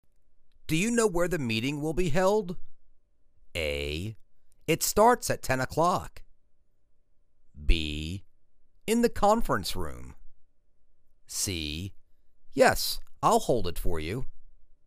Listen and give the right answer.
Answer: In the conference room.